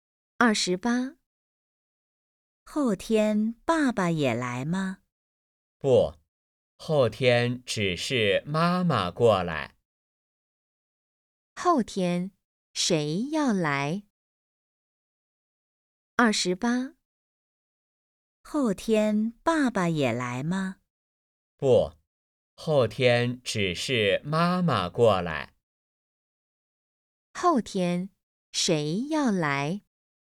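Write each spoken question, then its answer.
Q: 后天谁要来?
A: 妈妈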